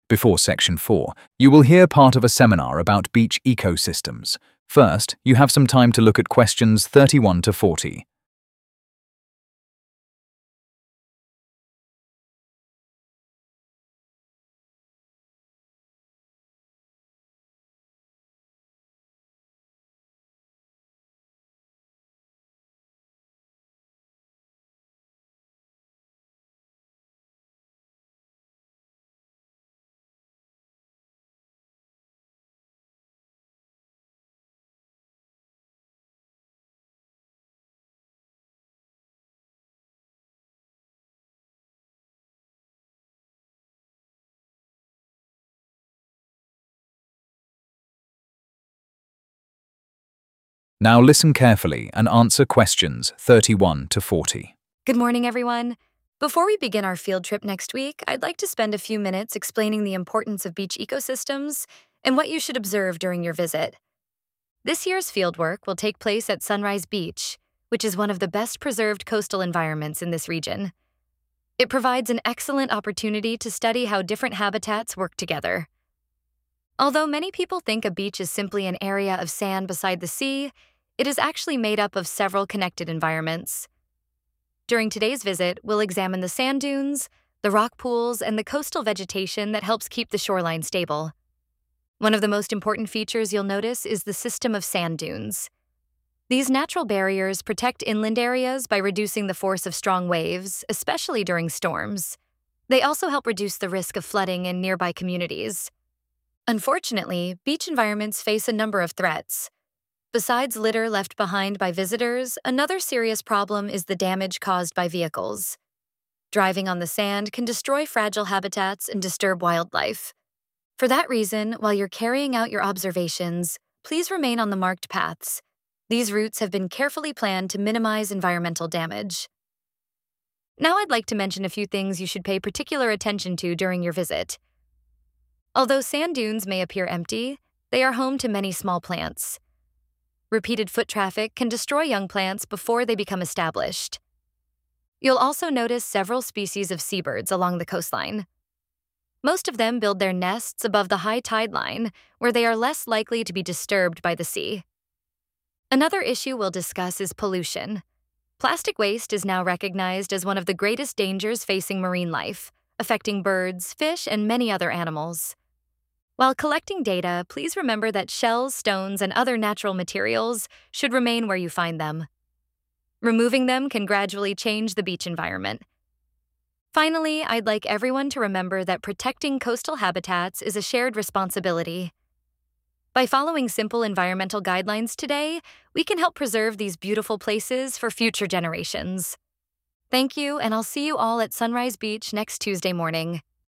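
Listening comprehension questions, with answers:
Complete the notes below. Write ONE WORD ONLY for each answer.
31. Preparation for field trip to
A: Sunrise

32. Coastal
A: vegetation

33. Strong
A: waves

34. Damage caused by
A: vehicles

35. Stay on marked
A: paths

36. Walking on sand dunes can destroy young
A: plants

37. Many seabirds build their nests above the high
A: tide

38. Plastic waste can seriously affect marine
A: life

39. Visitors should never remove shells or other natural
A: materials

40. The speaker says everyone should help protect the beach for future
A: generations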